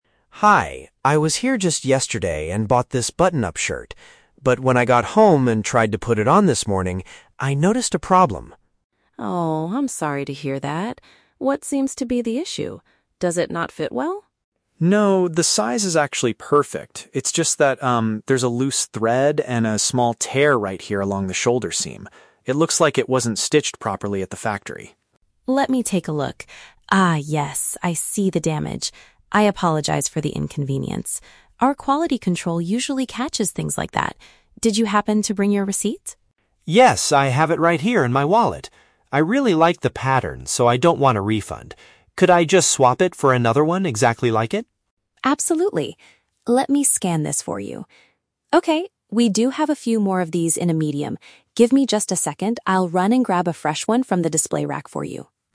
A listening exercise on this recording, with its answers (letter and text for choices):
Listen to the conversation between a customer and a cashier. For each question, choose the correct answer (A, B, or C).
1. What is the main reason the customer is returning the shirt?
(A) It is much too small for him to wear comfortably.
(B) He decided he dislikes the pattern after trying it on.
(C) There is some damage to the stitching on the upper part.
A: (C) There is some damage to the stitching on the upper part.

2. What does the cashier ask the customer to provide?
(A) His original proof of purchase from the store.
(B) A credit card so she can process his refund.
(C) The original price tag attached to the clothing.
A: (A) His original proof of purchase from the store.

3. How does the customer want to resolve the situation?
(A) Get his money back for the damaged clothing.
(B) Exchange it for an identical, undamaged item.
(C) Have the store's tailor repair the hole for him.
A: (B) Exchange it for an identical, undamaged item.

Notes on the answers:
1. The customer mentions a "loose thread and a small tear right here along the shoulder seam." This is paraphrased as "damage to the stitching on the upper part." Option A is a trap; the cashier asks if it doesn't fit well, but the customer says "the size is actually perfect." Option B is a trap because the customer explicitly says, "I really like the pattern."
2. The cashier asks, "Did you happen to bring your receipt?" A receipt is paraphrased as "proof of purchase." Option B is a trap; the word "refund" is mentioned later by the customer, but the cashier never asks for a credit card. Option C is a plausible store policy requirement, but it is not mentioned in the audio.
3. The customer asks, "Could I just swap it for another one exactly like it?" "Swap" is paraphrased as "exchange," and "exactly like it" means "identical." Option A is the trap; getting money back means a "refund," which the customer explicitly rejects ("I don't want a refund"). Option C is plausible, but repairing the shirt is never discussed.

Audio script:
Customer: Hi, I was here just yesterday and bought this button-up shirt. But when I got home and tried to put it on this morning, I noticed a problem.
Cashier: Oh, I'm sorry to hear that. What seems to be the issue? Does it not fit well?
Customer: No, the size is actually perfect. It's just that, um, there's a loose thread and a small tear right here along the shoulder seam. It looks like it wasn't stitched properly at the factory.
Cashier: Let me take a look. Ah, yes, I see the damage. I apologize for the inconvenience. Our quality control usually catches things like that. Did you happen to bring your receipt?
Customer: Yes, I have it right here in my wallet. I really like the pattern, so I don't want a refund. Could I just swap it for another one exactly like it?
Cashier: Absolutely. Let me scan this for you... Okay, we do have a few more of these in a medium. Give me just a second, I'll run and grab a fresh one from the display rack for you.